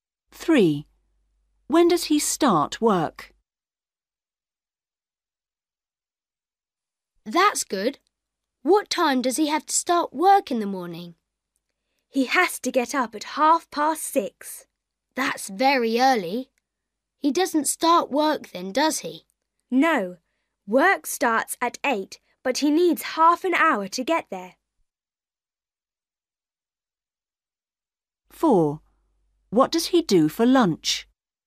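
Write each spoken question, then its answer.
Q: When does he start work?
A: at 8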